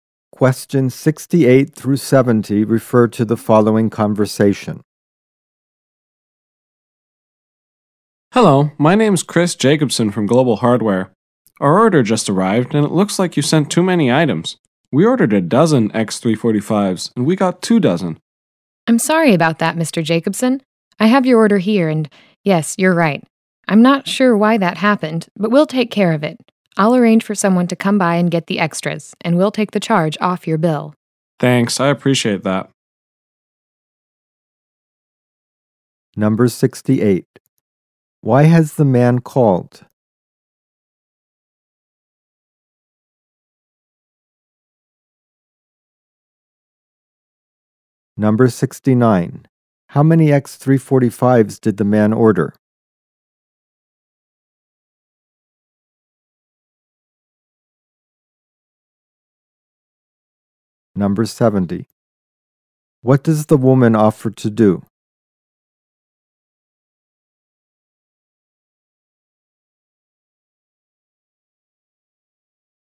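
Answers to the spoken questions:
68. He received too many items
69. A dozen
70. Have someone pick up the extras and remove the charge from his bill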